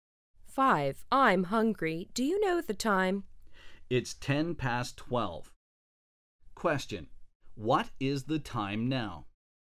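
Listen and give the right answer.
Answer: 12:10.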